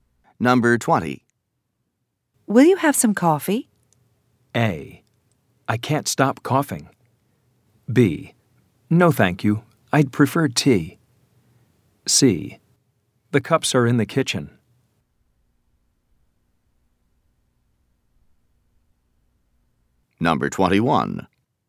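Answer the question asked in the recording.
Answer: B: No, thank you. I'd prefer tea.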